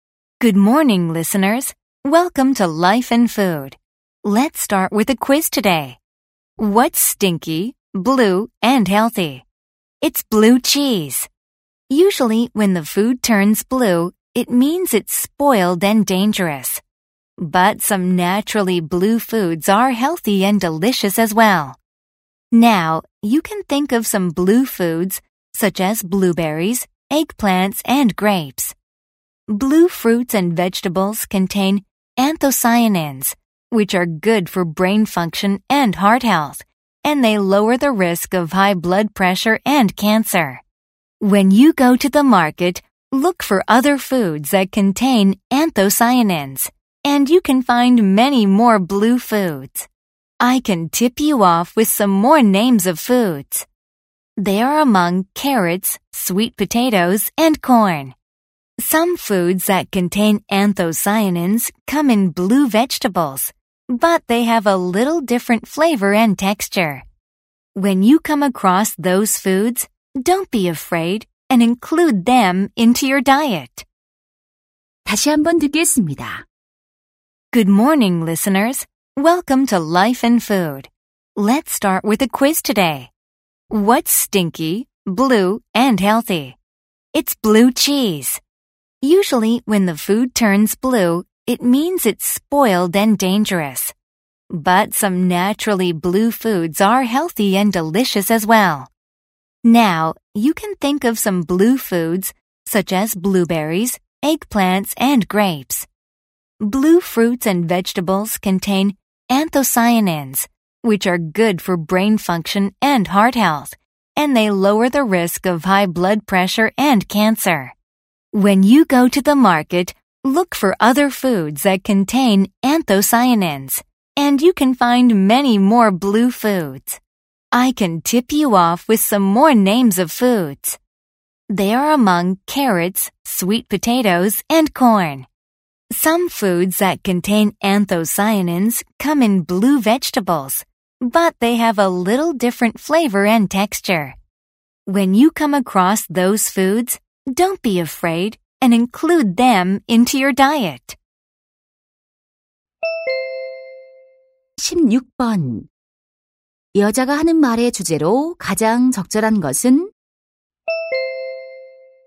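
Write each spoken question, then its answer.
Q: 여자가 하는 말의 주제로 가장 적절한 것은?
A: 안토시아닌이 들어 있는 건강한 파란색 음식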